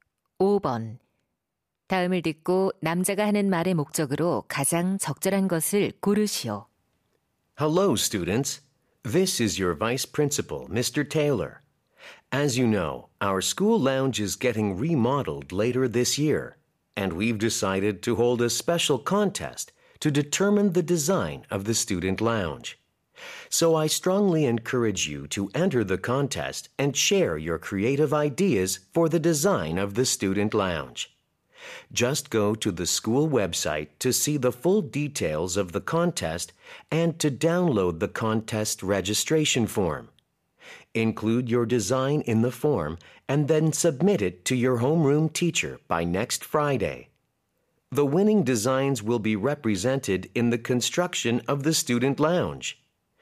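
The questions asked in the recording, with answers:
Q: 다음을 듣고 남자가 하는 말의 목적으로 가장 적절한 것을 고르시오.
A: 학생 라운지 디자인 공모전 참가 독려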